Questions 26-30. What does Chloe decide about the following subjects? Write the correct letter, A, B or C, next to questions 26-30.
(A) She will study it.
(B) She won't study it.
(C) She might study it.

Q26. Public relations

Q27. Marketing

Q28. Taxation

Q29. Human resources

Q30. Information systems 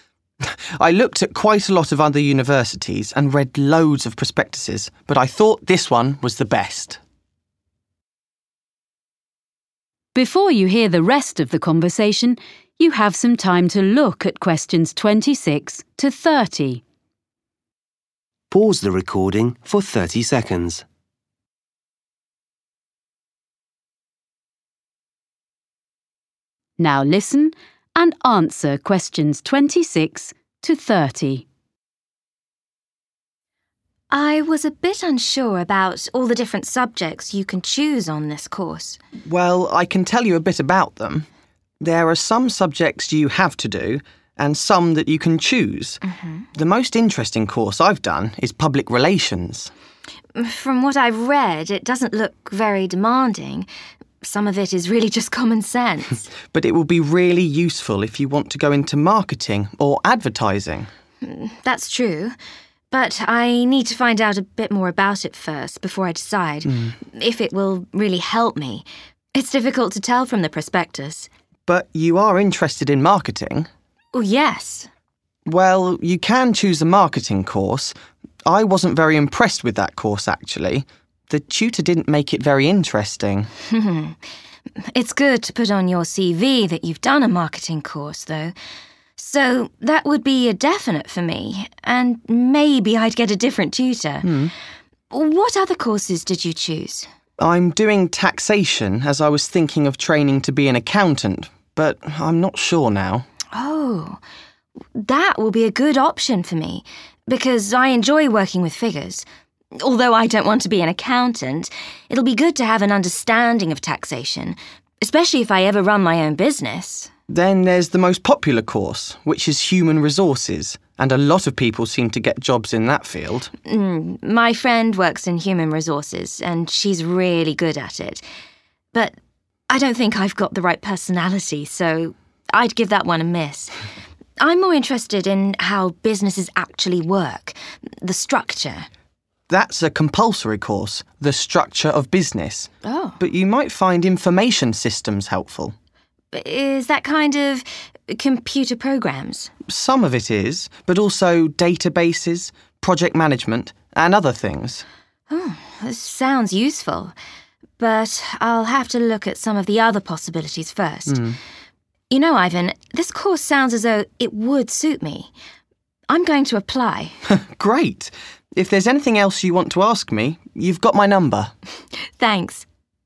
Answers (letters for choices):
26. C
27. A
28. A
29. B
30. C